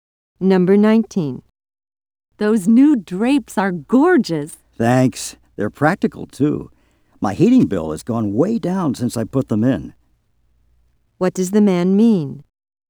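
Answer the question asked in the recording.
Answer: The drapes have lowered his heating bill.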